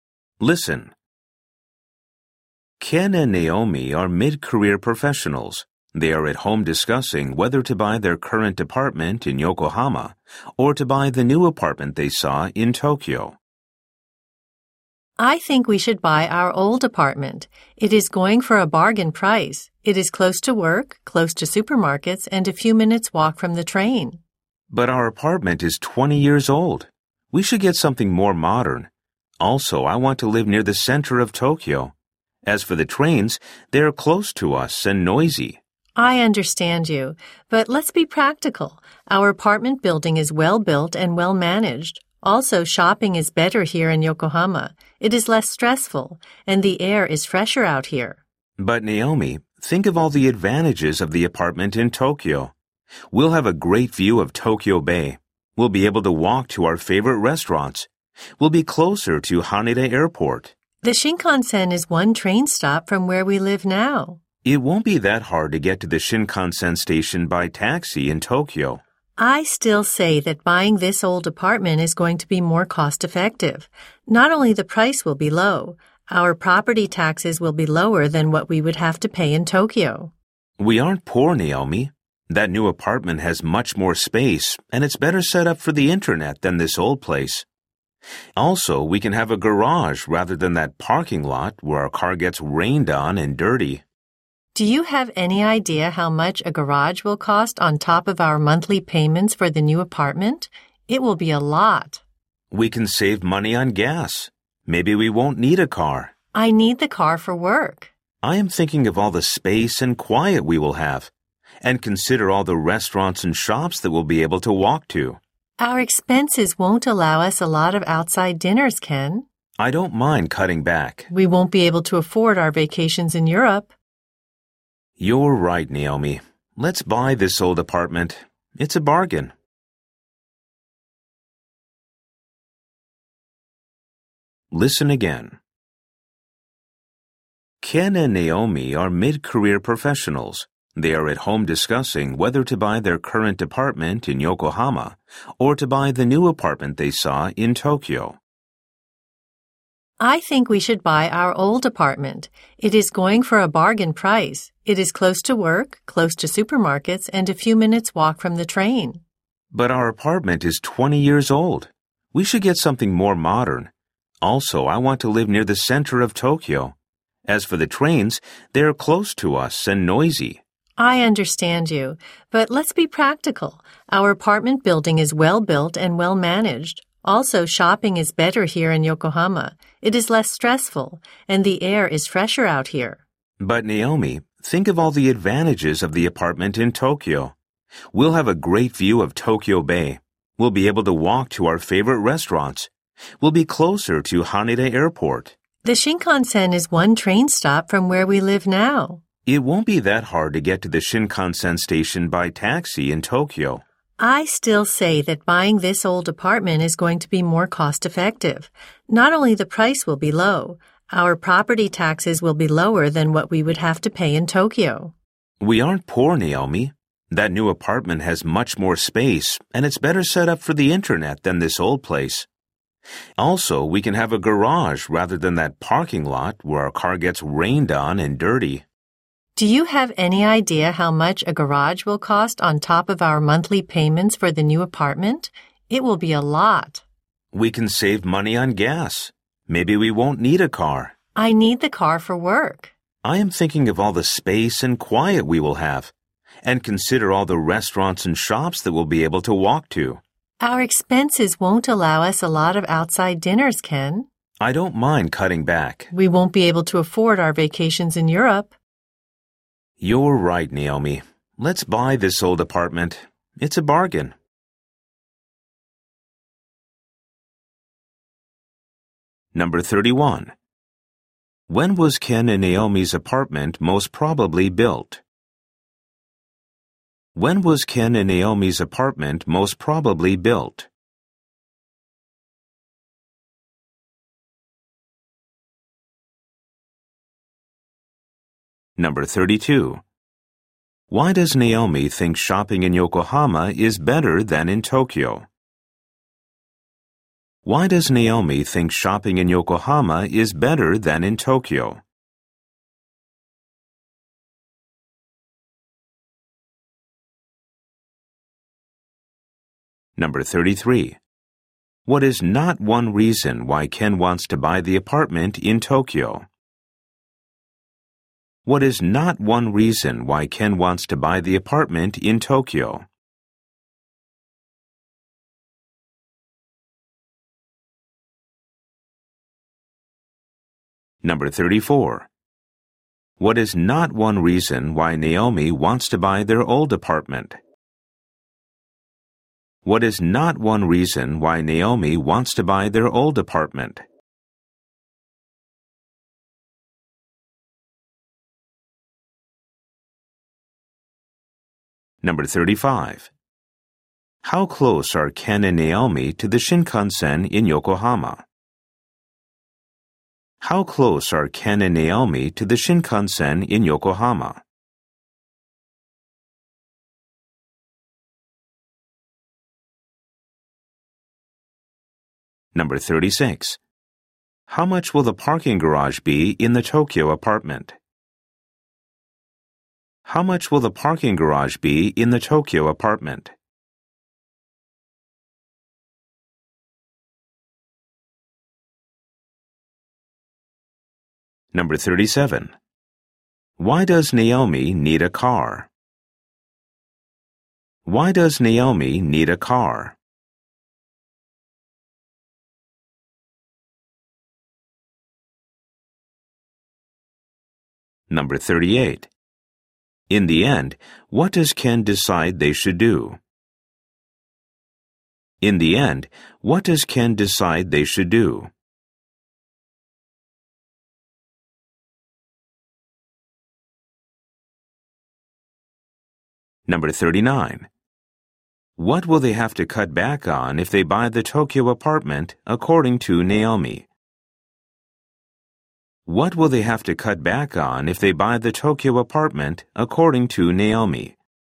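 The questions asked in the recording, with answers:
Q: When was Ken and Naomi's apartment most probably built?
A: About 20 years ago

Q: How close are Ken and Naomi to the Shinkansen in Yokohama?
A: One train stop

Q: In the end, what does Ken decide they should do?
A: Buy their old apartment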